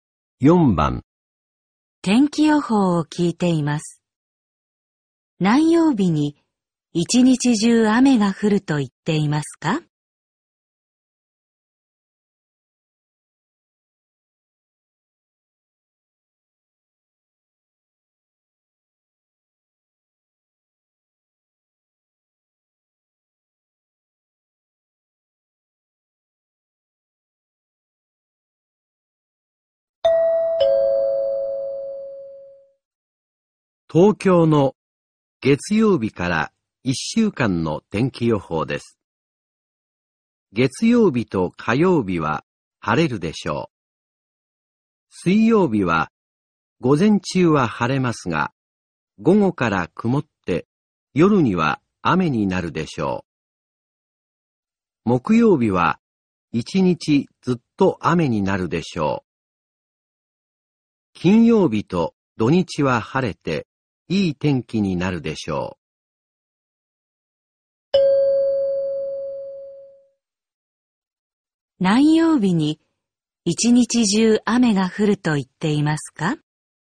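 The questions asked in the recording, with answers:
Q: 何曜日に一日中雨が降ると言っていますか?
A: 木曜日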